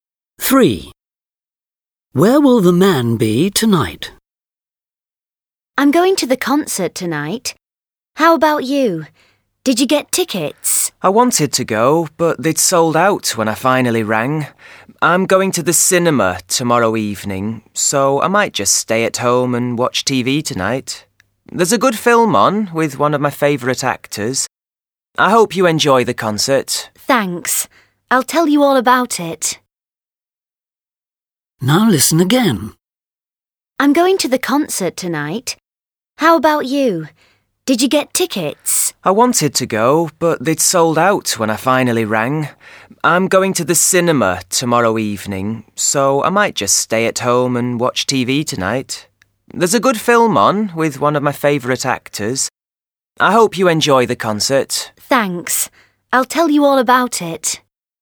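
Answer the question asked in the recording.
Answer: At home (watching TV)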